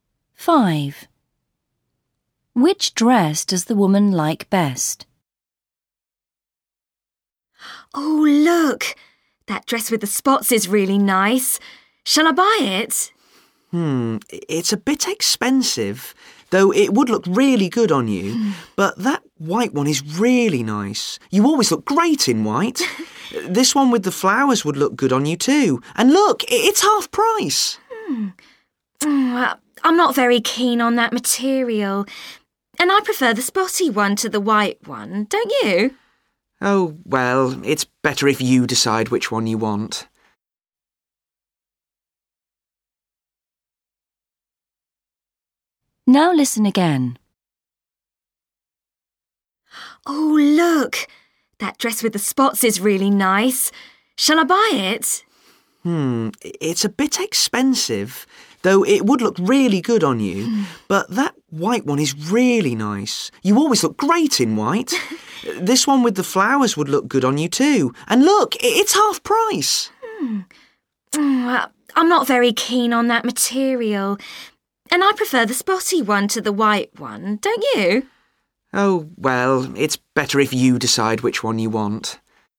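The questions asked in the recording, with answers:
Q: Which dress does the woman like best?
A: The dress with spots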